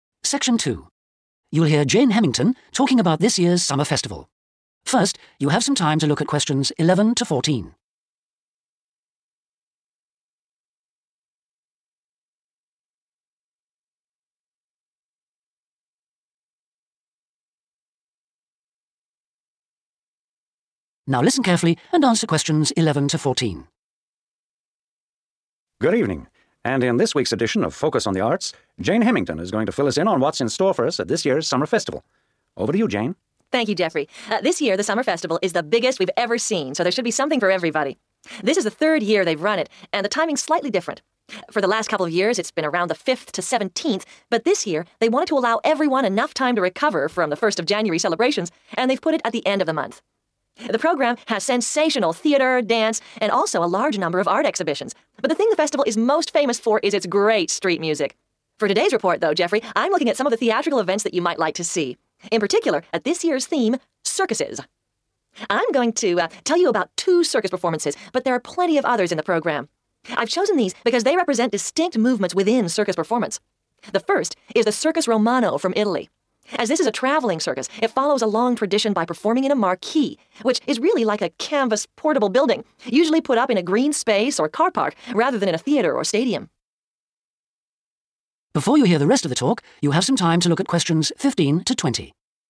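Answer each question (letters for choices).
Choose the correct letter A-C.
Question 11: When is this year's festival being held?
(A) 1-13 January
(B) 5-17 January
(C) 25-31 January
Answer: C

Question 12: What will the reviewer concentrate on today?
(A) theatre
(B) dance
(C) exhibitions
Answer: A

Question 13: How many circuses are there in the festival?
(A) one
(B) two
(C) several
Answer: C

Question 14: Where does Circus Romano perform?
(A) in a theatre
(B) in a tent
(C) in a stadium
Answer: B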